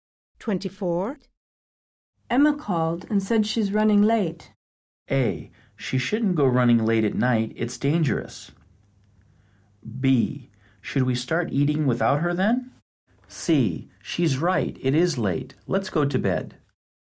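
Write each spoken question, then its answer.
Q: Emma called and said she's running late.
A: B: Should we start eating without her then?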